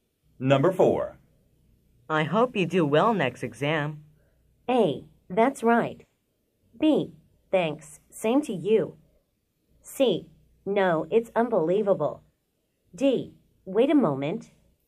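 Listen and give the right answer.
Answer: B: Thanks. Same to you.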